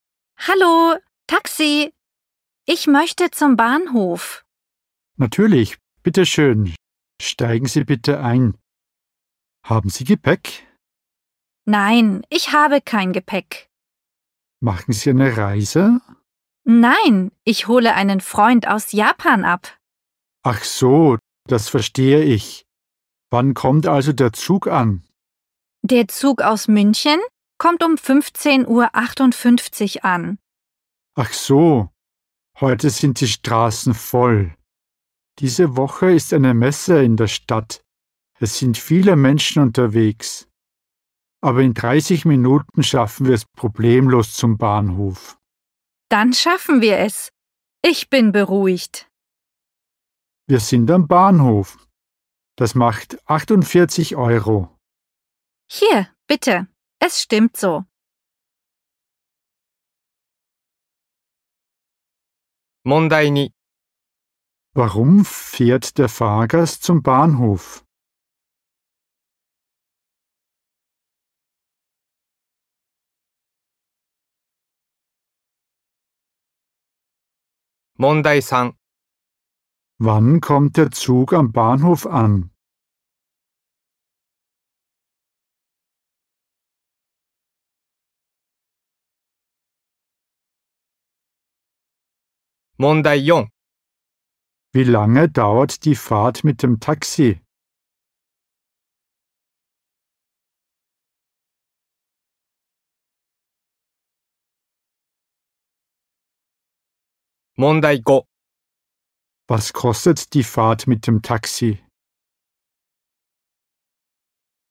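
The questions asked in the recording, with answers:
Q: Warum fährt der Fahrgast zum Bahnhof?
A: Er holt einen Freund aus Japan ab.

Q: Wann kommt der Zug am Bahnhof an?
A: Um 15.58 Uhr

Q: Wie lange dauert die Fahrt mit dem Taxi?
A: 30 Minuten

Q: Was kostet die Fahrt mit dem Taxi?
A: 48 Euro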